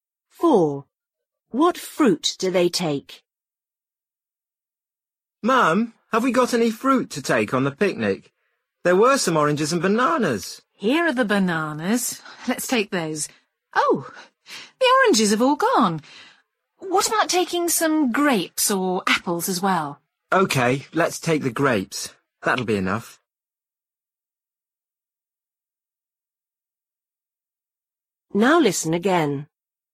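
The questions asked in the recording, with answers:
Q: What fruit do they take?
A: Bananas and grapes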